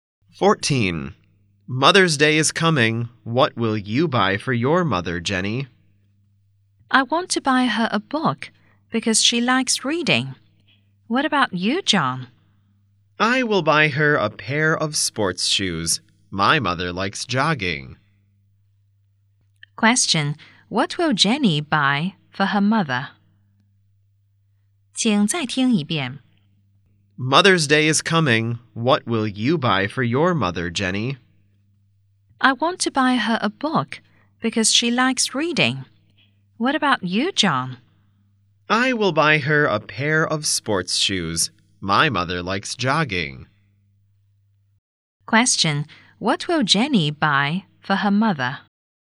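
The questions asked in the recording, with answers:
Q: What will Jenny buy for her mother?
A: A book.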